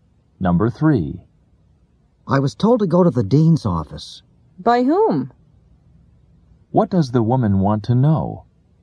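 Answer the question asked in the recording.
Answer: Who told the man to go to the dean's office.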